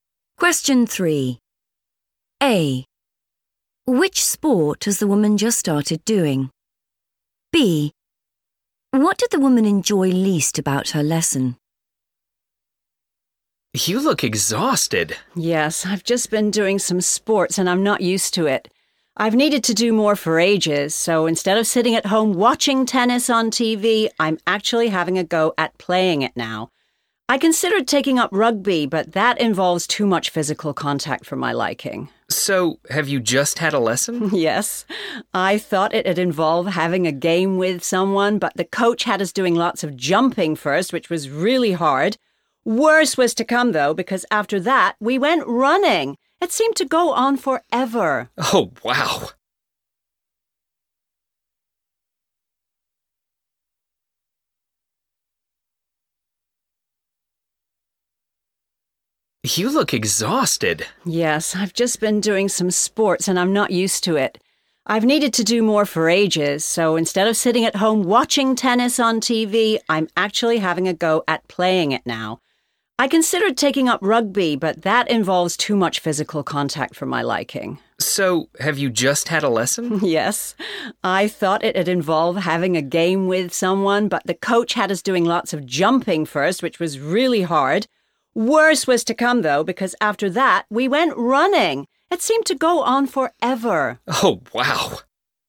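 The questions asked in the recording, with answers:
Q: Which sport has the woman just started doing?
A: tennis

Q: What did the woman enjoy least about her lesson?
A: the running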